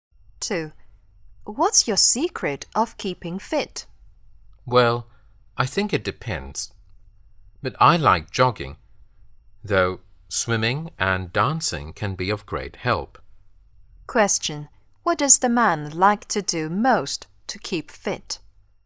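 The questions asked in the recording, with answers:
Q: What does the man like to do most to keep fit?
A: Jogging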